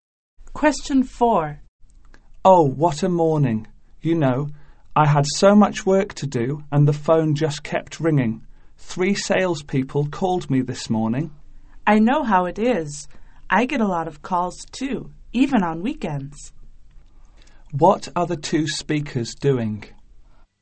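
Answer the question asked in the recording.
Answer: Complaining about too many phone calls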